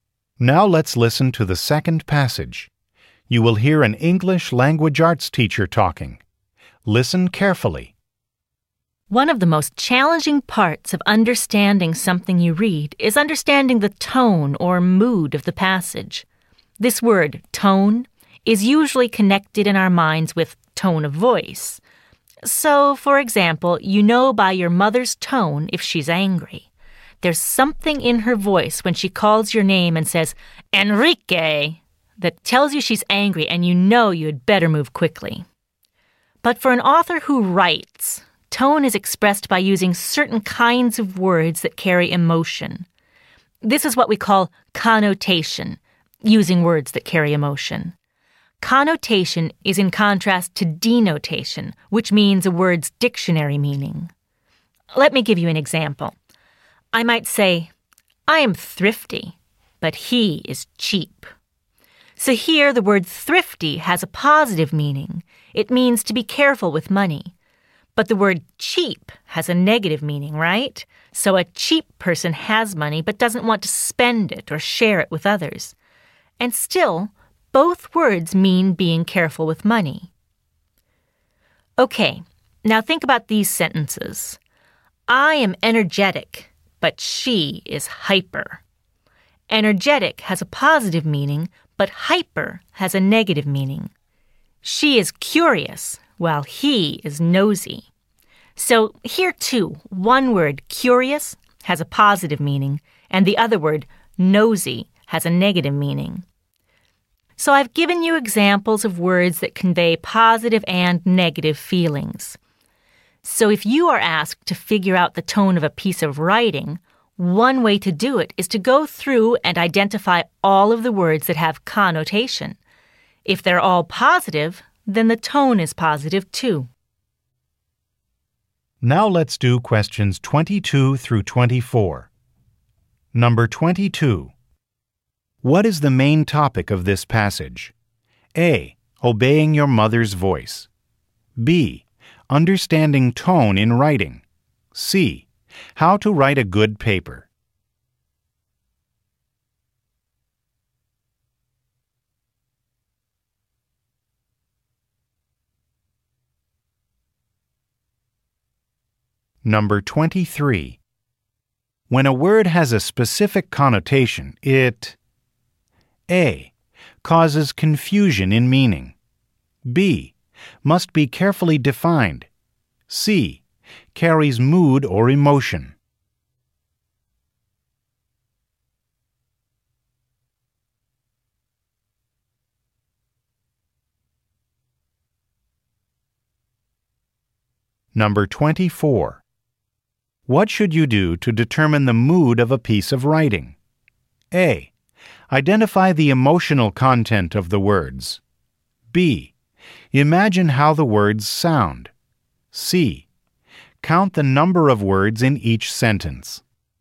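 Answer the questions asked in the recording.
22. B: Understanding tone in writing.
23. C: carries mood or emotion.
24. A: Identify the emotional content of the words.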